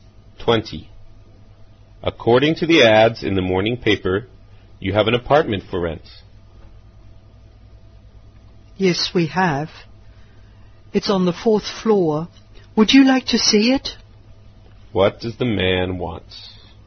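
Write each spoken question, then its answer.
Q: What does the man want?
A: To rent an apartment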